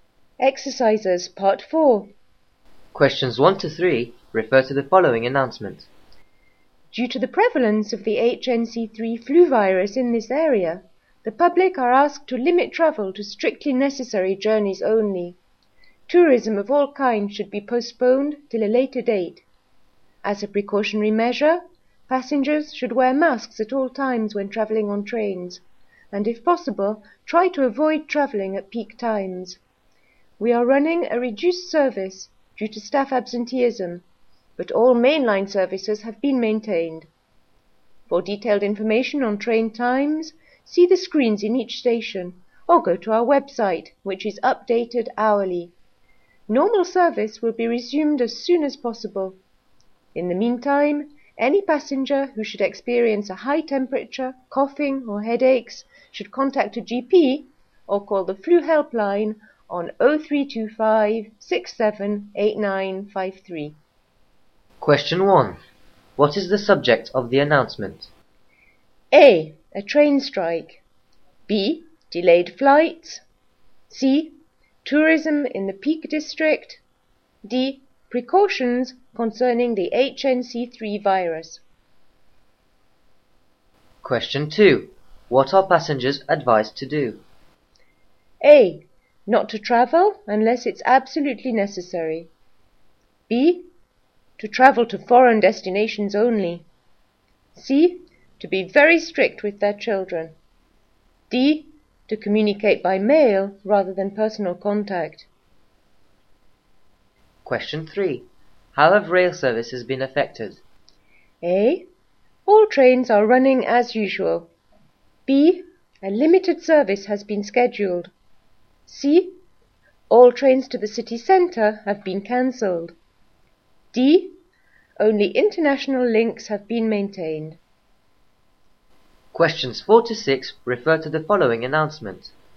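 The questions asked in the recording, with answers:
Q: What is the subject of the announcement?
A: D: Precautions concerning the HNC3 virus.

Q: What are passengers advised to do?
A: A: Not to travel unless it's absolutely necessary.

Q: How have rail services been affected?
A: B: A limited service has been scheduled.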